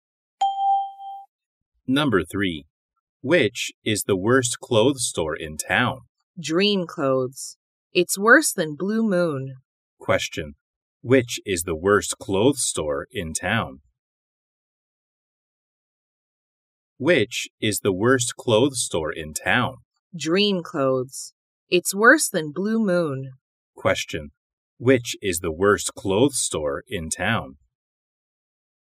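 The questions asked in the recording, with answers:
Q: Which is the worst clothes store in town?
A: Dream Clothes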